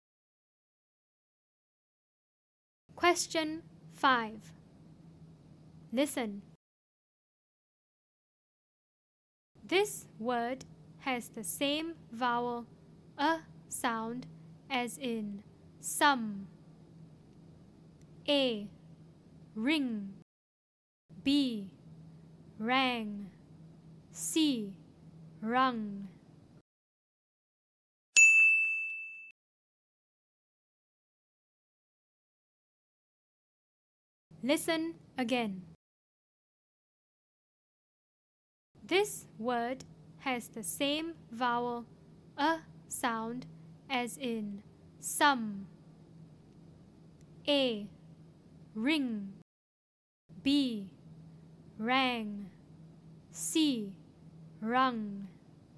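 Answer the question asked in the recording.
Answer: C: Rung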